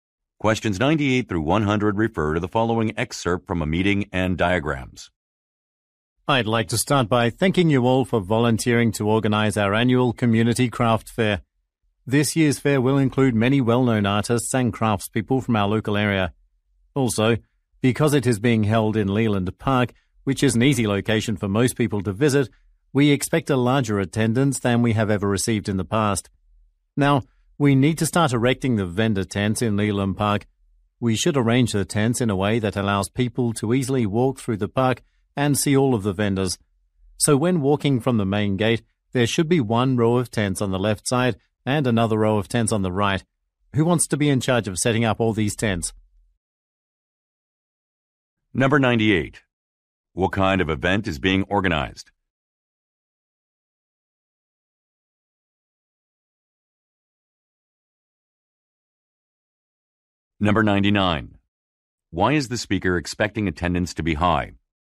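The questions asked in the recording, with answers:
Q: What kind of event is being organized?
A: A community craft fair

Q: Why is the speaker expecting attendance to be high?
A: The location is easy to visit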